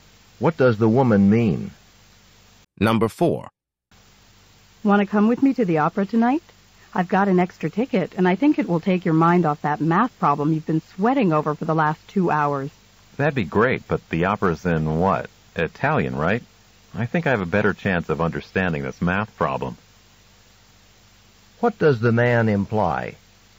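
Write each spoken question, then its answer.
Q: What does the man imply?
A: He wouldn't understand the opera because it's in Italian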